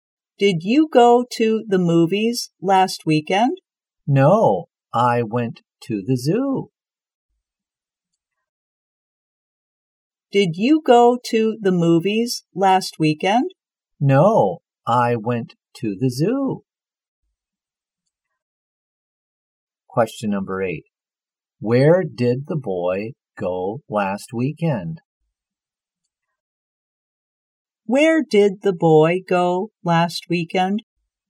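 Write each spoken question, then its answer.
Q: Where did the boy go last weekend?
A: To the zoo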